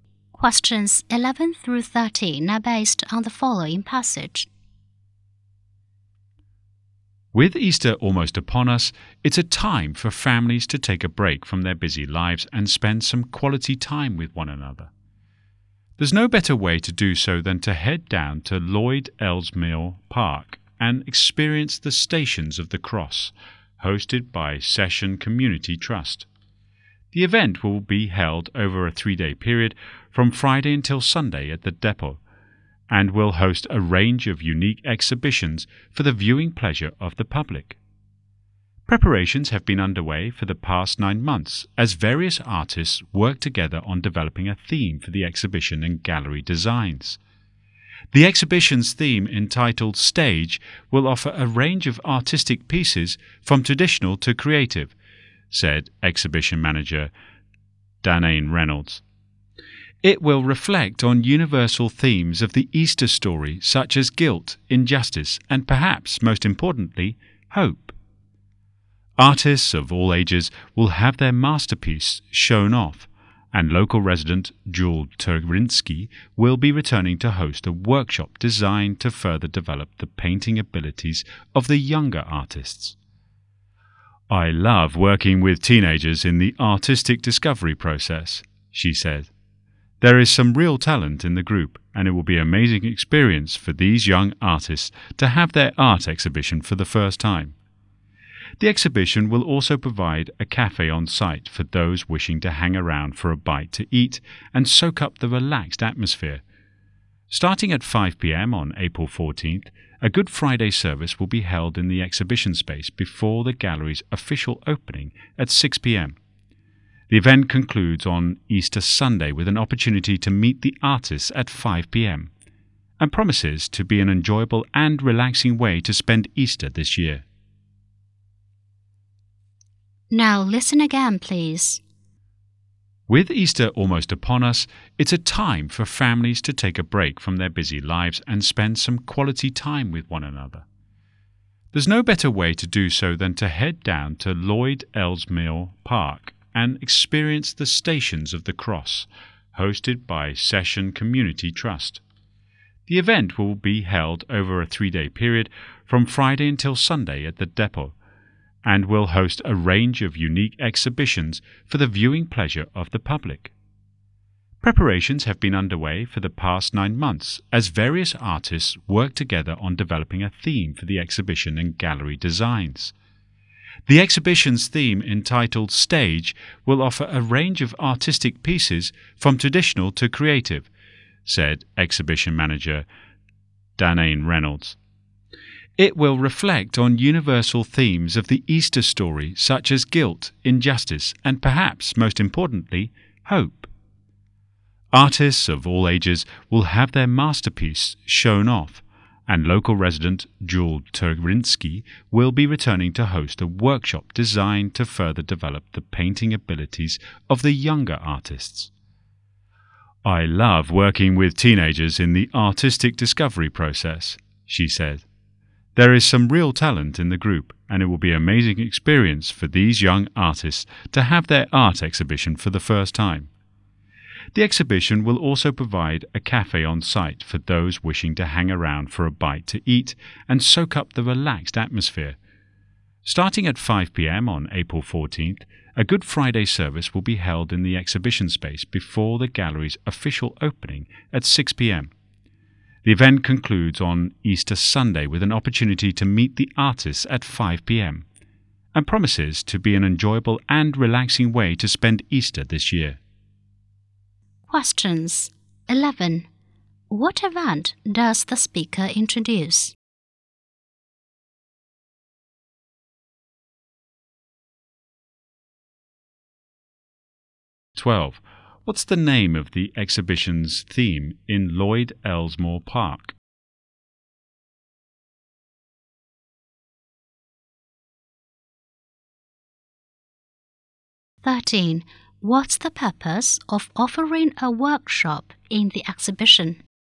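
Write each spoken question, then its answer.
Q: What event does the speaker introduce?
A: An Easter art exhibition, the Stations of the Cross

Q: What's the name of the exhibition's theme in Lloyd Ellesmere Park?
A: Stage

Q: What's the purpose of offering a workshop in the exhibition?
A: To develop the painting abilities of younger artists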